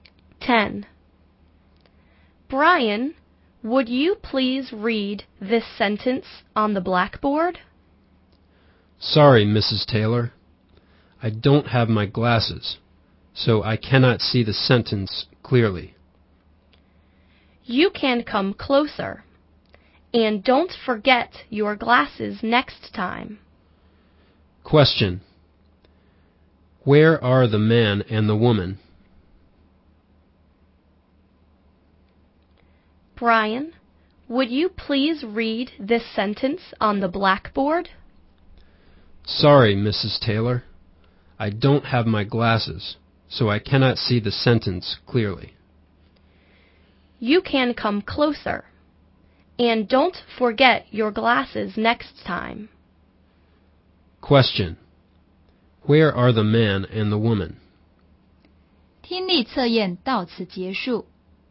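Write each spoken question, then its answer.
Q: Where are the man and the woman?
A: In a classroom.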